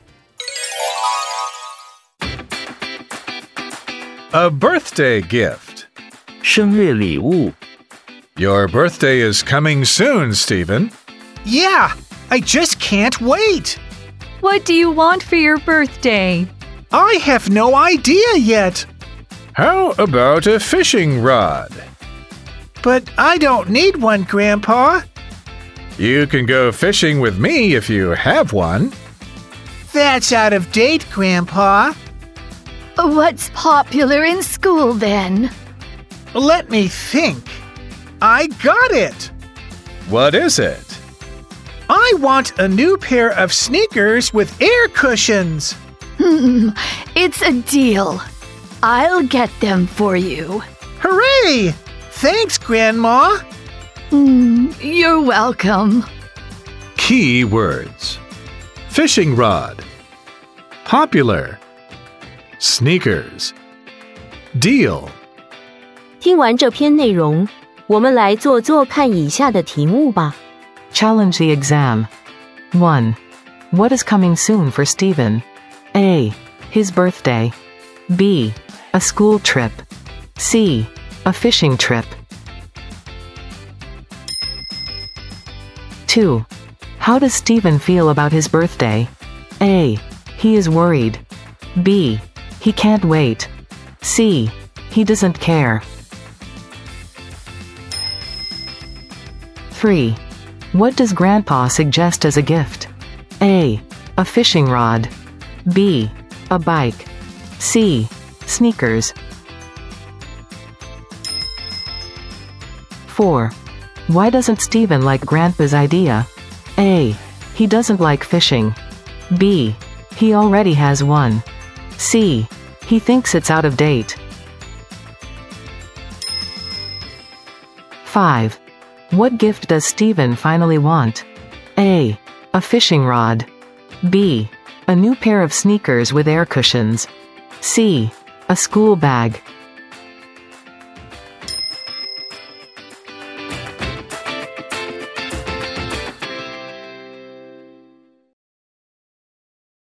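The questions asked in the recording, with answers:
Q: What is coming soon for Stephen?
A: A: His birthday

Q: How does Stephen feel about his birthday?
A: B: He can't wait

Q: What does Grandpa suggest as a gift?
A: A: A fishing rod

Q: Why doesn't Stephen like Grandpa's idea?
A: C: He thinks it's out of date

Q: What gift does Stephen finally want?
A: B: A new pair of sneakers with air cushions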